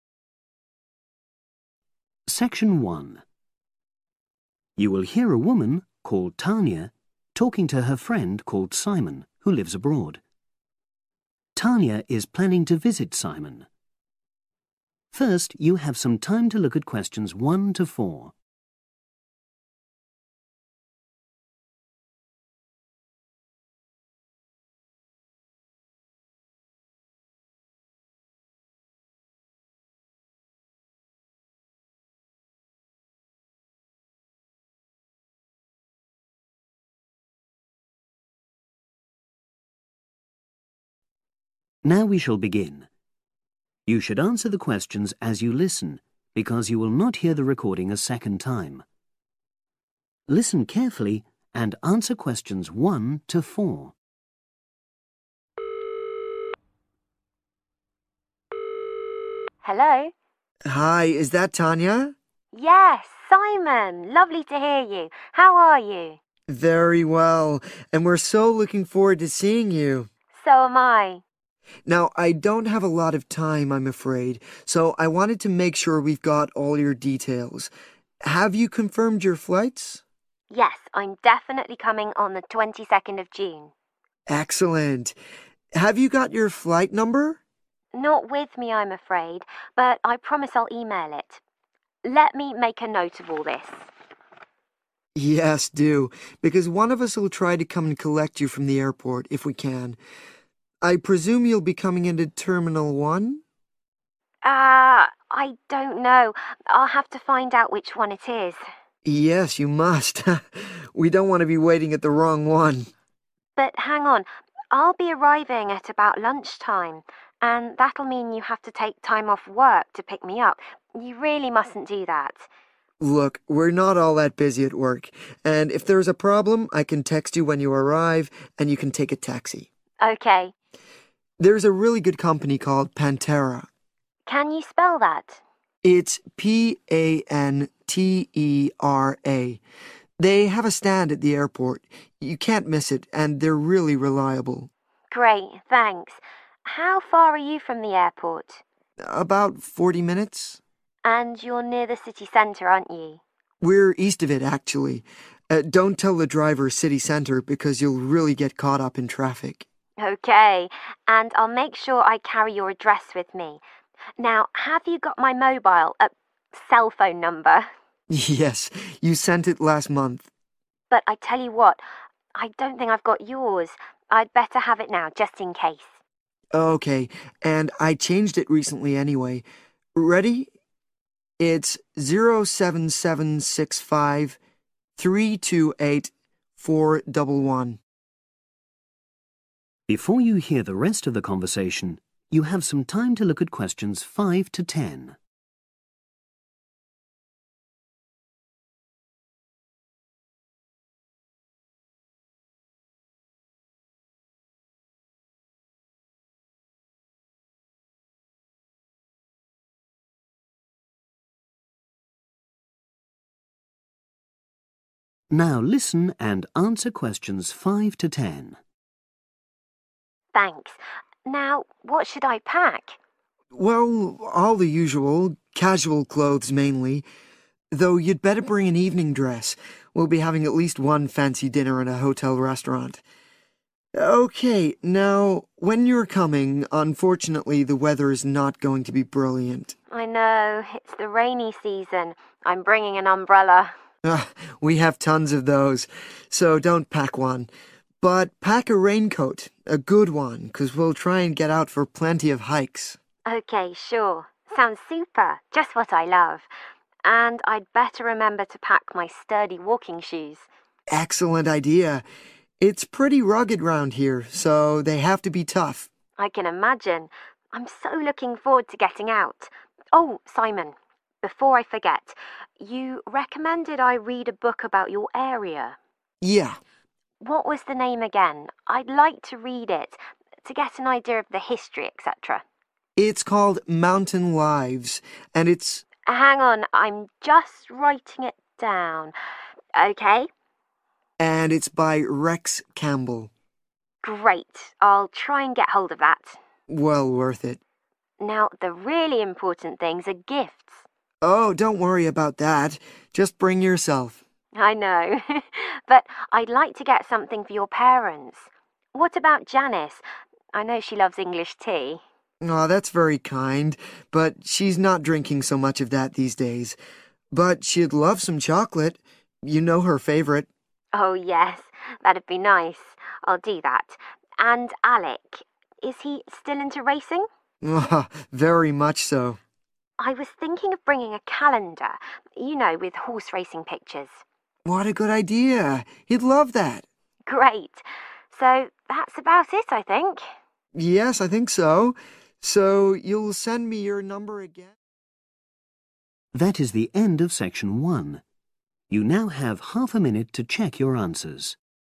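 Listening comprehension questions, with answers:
Complete the notes below. Write NO MORE THAN TWO WORDS OR A NUMBER.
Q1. Must find out which (1) arriving at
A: terminal

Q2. Best taxi company (2)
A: Pantera

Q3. Note: Simon lives in the (3) of the city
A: east

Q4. Simon's cell phone number (4)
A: 07765328411

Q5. One smart dress – to wear at a (5)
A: fancy dinner

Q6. A good (6)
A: raincoat

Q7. Tough (7)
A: walking shoes

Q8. Try to find book named (8) by Rox Campbell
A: Mountain Lives

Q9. For Janice (9)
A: chocolate

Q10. For Alec (10) (with racing pictures)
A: calendar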